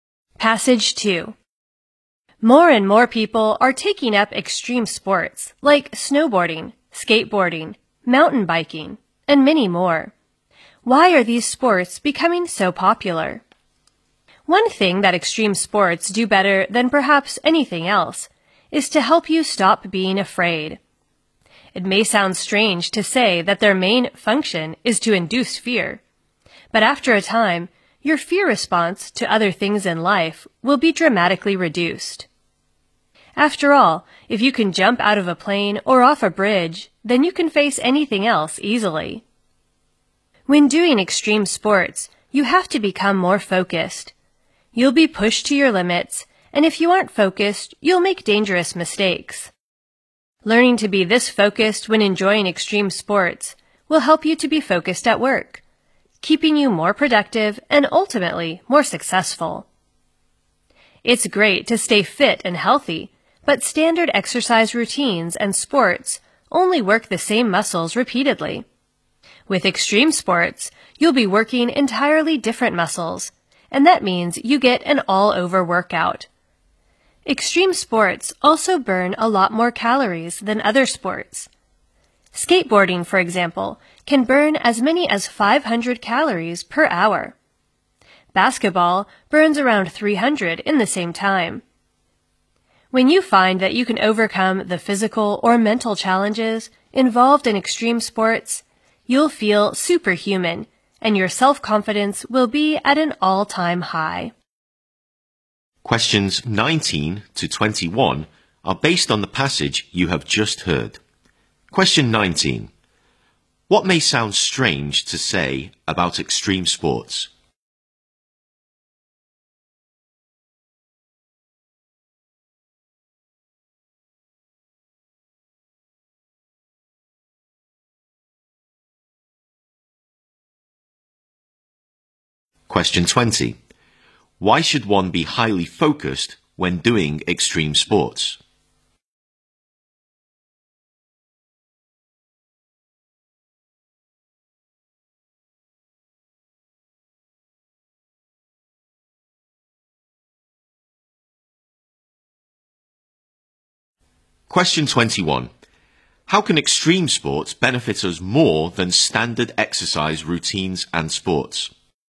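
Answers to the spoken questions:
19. Their main function is to induce fear
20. Otherwise one will make dangerous mistakes
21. They work different muscles, giving an all-over workout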